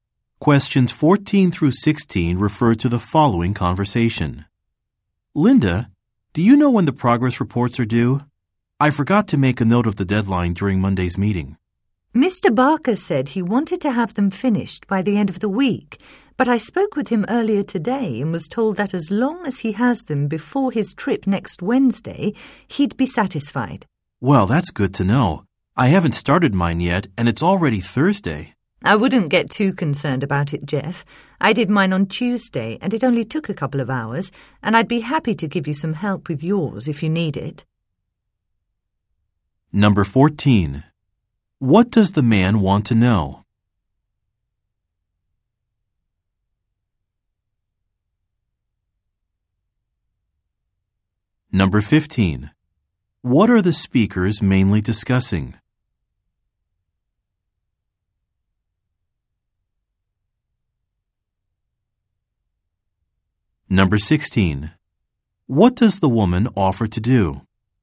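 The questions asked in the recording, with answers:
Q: What does the man want to know?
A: When the progress reports are due

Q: What are the speakers mainly discussing?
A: The deadline for progress reports

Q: What does the woman offer to do?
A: Help the man with his report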